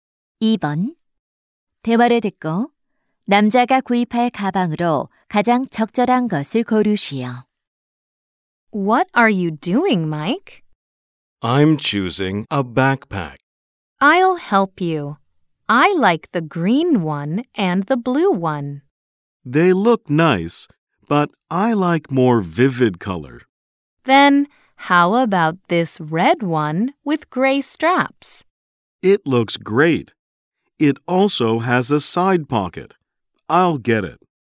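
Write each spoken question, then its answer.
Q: 대화를 듣고 남자가 구입할 가방으로 가장 적절한 것을 고르시오.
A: 회색 끈이 달린 빨간 배낭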